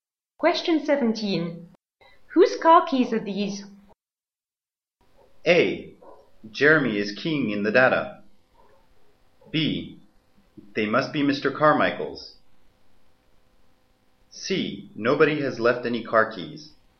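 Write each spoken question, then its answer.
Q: Whose car keys are these?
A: B: They must be Mr. Carmichael's.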